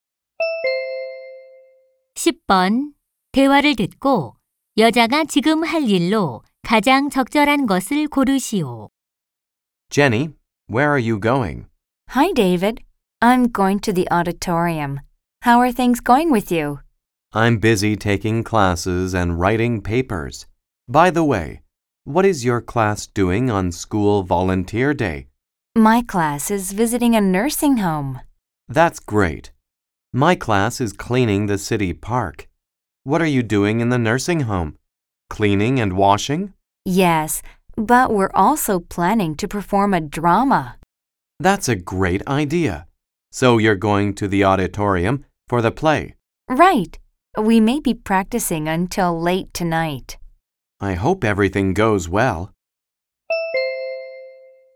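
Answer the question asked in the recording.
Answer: 강당에서 연극 연습하기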